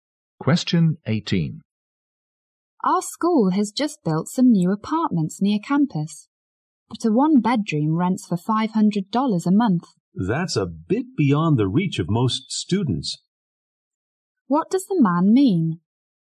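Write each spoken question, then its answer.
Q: What does the man mean?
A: Most students can't afford the new apartments.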